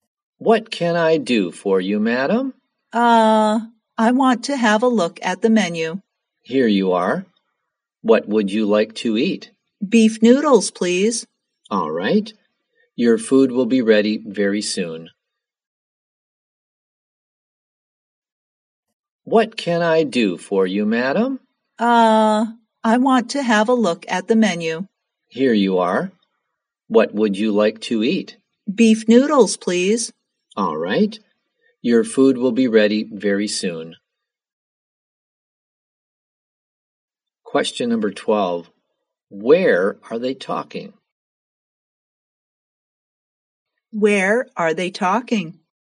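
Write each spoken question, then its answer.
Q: Where are they talking?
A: In a restaurant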